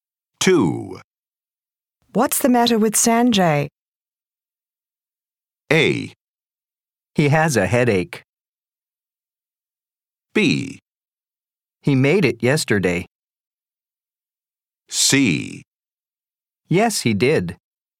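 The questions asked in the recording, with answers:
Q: What's the matter with Sanjay?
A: A: He has a headache.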